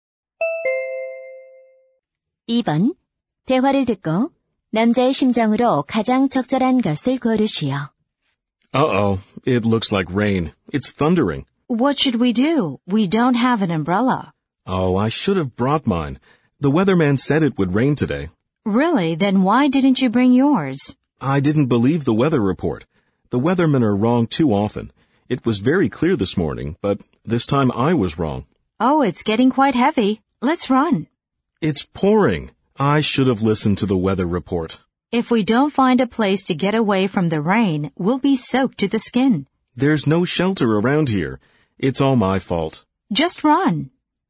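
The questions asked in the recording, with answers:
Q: 대화를 듣고 남자의 심정으로 가장 적절한 것을 고르시오.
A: 후회스러움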